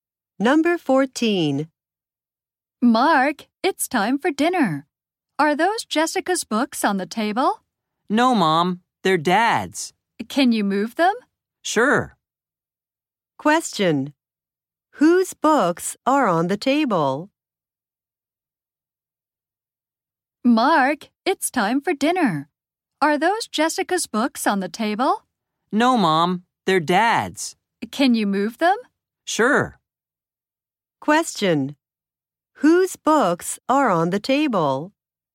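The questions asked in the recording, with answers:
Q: Whose books are on the table?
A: Dad's.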